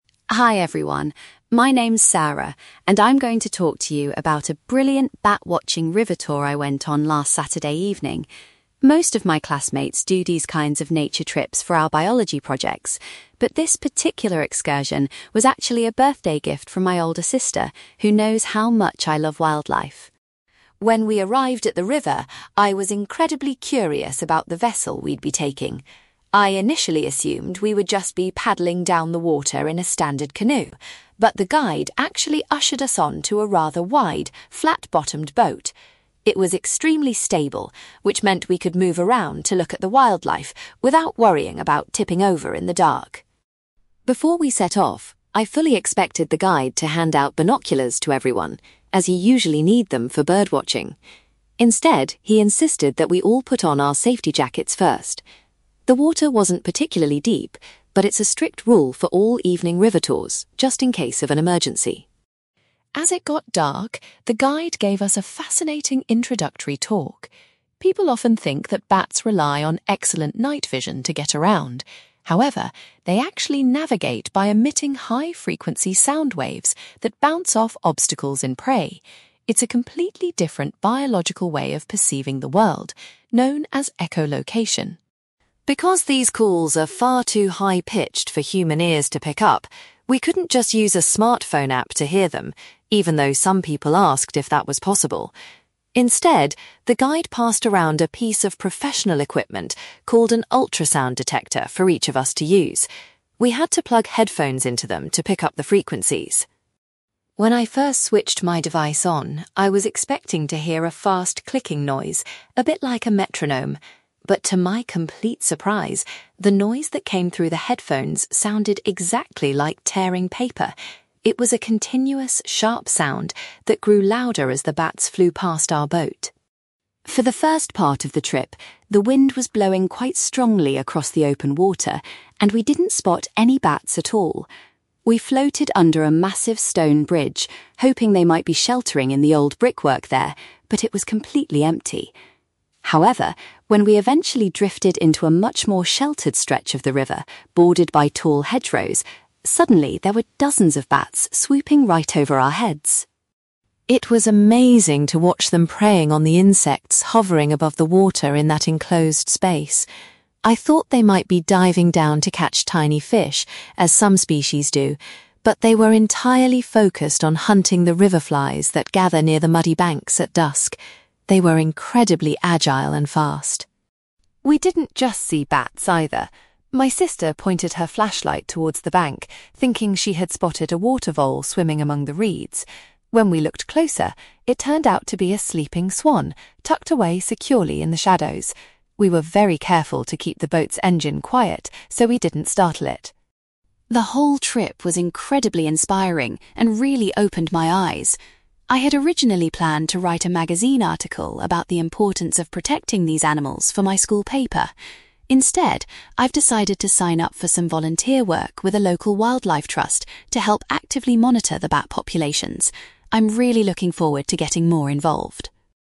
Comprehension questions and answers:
You will hear a student called Sarah giving a presentation about a bat-watching boat trip she went on. For questions 9-18, complete the sentences with a word or short phrase.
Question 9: Sarah explains that her river trip was given to her as a (9)........................... by a family member.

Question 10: Rather than travelling in a canoe, Sarah's group was seated in a (10)........................... .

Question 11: The guide required all participants to wear (11)........................... before the tour could begin.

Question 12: Sarah learned that bats use (12)........................... to avoid obstacles in the dark.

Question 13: The participants were given an (13)........................... so they could listen to the bats' calls.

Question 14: Sarah compares the noise the bats made through the headphones to the sound of (14)........................... .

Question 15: The highest concentration of bats was found where the river was protected by (15)........................... .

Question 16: Sarah observed that the bats were feeding exclusively on (16)........................... near the water's edge.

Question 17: An animal that Sarah's sister mistakenly thought was a water vole was actually a (17)........................... .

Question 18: As a result of the trip, Sarah is planning to undertake some (18)........................... for a wildlife charity.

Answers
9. birthday gift
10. flat-bottomed boat
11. safety jackets
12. sound waves
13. ultrasound detector
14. tearing paper
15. tall hedgerows
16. river flies
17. sleeping swan
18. volunteer work

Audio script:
Sarah: Hi everyone. My name's Sarah, and I'm going to talk to you about a brilliant bat-watching river tour I went on last Saturday evening. Most of my classmates do these kinds of nature trips for our biology projects, but this particular excursion was actually a birthday gift from my older sister, who knows how much I love wildlife.
When we arrived at the river, I was incredibly curious about the vessel we'd be taking. I initially assumed we would just be paddling down the water in a standard canoe, but the guide actually ushered us onto a rather wide, flat-bottomed boat. It was extremely stable, which meant we could move around to look at the wildlife without worrying about tipping over in the dark.
Before we set off, I fully expected the guide to hand out binoculars to everyone, as you usually need them for bird watching. Instead, he insisted that we all put on our safety jackets first. The water wasn't particularly deep, but it's a strict rule for all evening river tours just in case of an emergency.
As it got dark, the guide gave us a fascinating introductory talk. People often think that bats rely on excellent night vision to get around. However, they actually navigate by emitting high-frequency sound waves that bounce off obstacles and prey. It's a completely different biological way of perceiving the world, known as echolocation.
Because these calls are far too high-pitched for human ears to pick up, we couldn't just use a smartphone app to hear them, even though some people asked if that was possible. Instead, the guide passed around a piece of professional equipment called an ultrasound detector for each of us to use. We had to plug headphones into them to pick up the frequencies.
When I first switched my device on, I was expecting to hear a fast clicking noise, a bit like a metronome. But to my complete surprise, the noise that came through the headphones sounded exactly like tearing paper. It was a continuous, sharp sound that grew louder as the bats flew past our boat.
For the first part of the trip, the wind was blowing quite strongly across the open water, and we didn't spot any bats at all. We floated under a massive stone bridge, hoping they might be sheltering in the old brickwork there, but it was completely empty. However, when we eventually drifted into a much more sheltered stretch of the river bordered by tall hedgerows, suddenly there were dozens of bats swooping right over our heads!
It was amazing to watch them preying on the insects hovering above the water in that enclosed space. I thought they might be diving down to catch tiny fish, as some species do, but they were entirely focused on hunting the river flies that gather near the muddy banks at dusk. They were incredibly agile and fast.
We didn't just see bats, either. My sister pointed her flashlight towards the bank, thinking she had spotted a water vole swimming among the reeds. When we looked closer, it turned out to be a sleeping swan tucked away securely in the shadows. We were very careful to keep the boat's engine quiet so we didn't startle it.
The whole trip was incredibly inspiring and really opened my eyes. I had originally planned to write a magazine article about the importance of protecting these animals for my school paper. Instead, I've decided to sign up for some volunteer work with a local wildlife trust to help actively monitor the bat populations. I'm really looking forward to getting more involved!

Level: B2